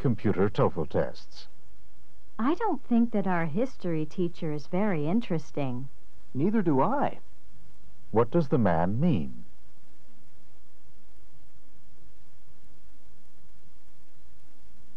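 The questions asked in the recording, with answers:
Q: What does the man mean?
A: He agrees that the history teacher isn't interesting.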